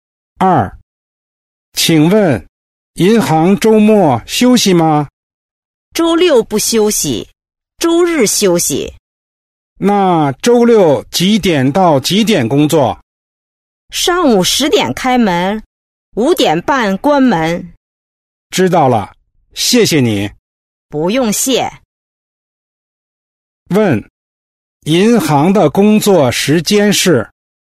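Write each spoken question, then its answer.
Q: 银行的工作时间是?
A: 上午10:00到5:30,周日休息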